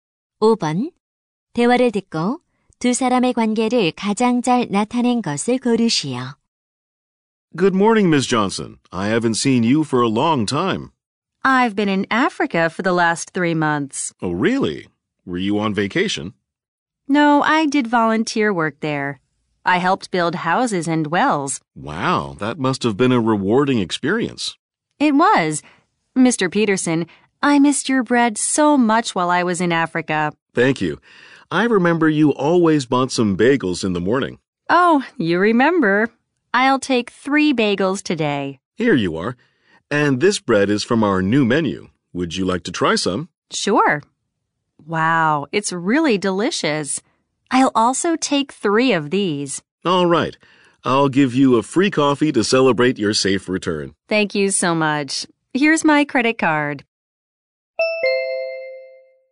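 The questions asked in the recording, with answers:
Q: 대화를 듣고 두 사람의 관계를 가장 잘 나타낸 것을 고르시오.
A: 손님 - 제과점 주인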